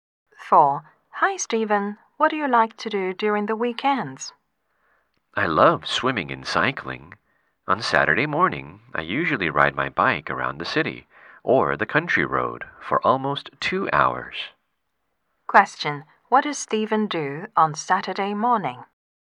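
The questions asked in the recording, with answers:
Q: What does Stephen do on Saturday morning?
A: He rides his bike for almost 2 hours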